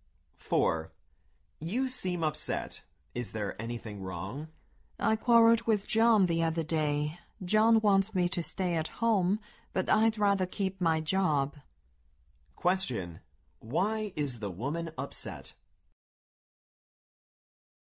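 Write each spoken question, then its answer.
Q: Why is the woman upset?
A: She quarreled with John, who wants her to stay at home, but she wants to keep her job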